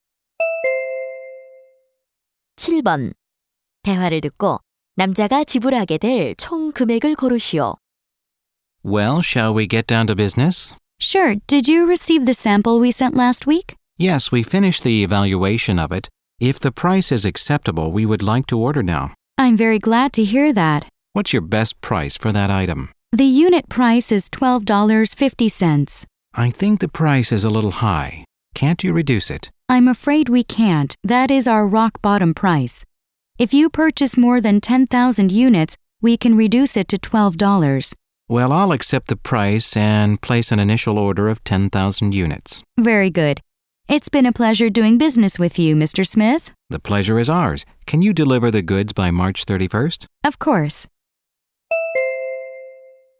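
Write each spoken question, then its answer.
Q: 대화를 듣고 남자가 지불하게 될 총 금액을 고르시오.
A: 12만 달러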